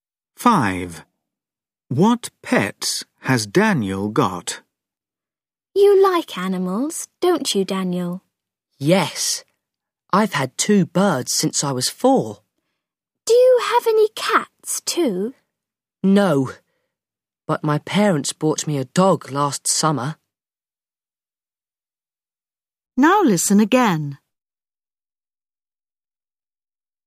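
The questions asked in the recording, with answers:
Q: What pets has Daniel got?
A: two birds and a dog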